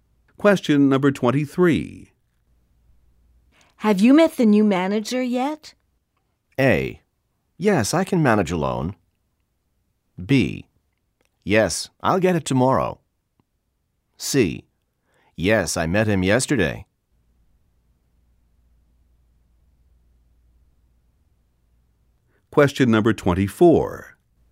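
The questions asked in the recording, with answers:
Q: Have you met the new manager yet?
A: C: Yes, I met him yesterday.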